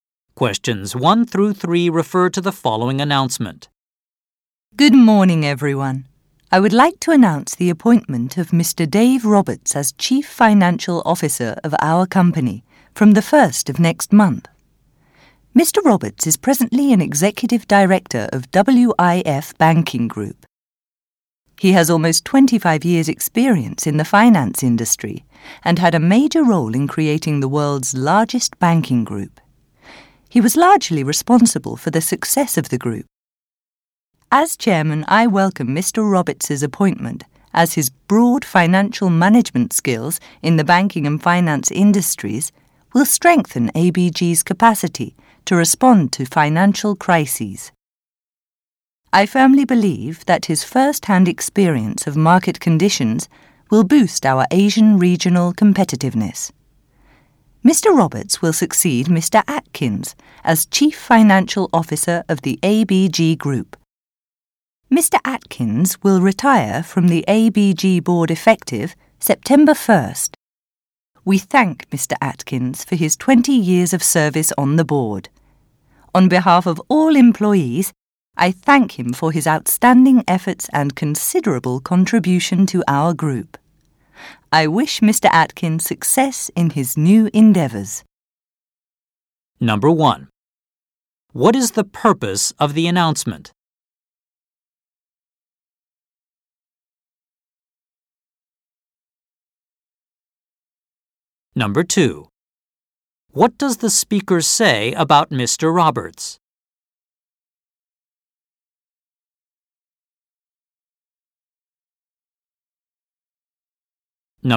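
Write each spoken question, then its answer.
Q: What is the purpose of the announcement?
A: To announce the appointment of a new Chief Financial Officer

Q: What will happen next month?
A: Mr. Roberts will become Chief Financial Officer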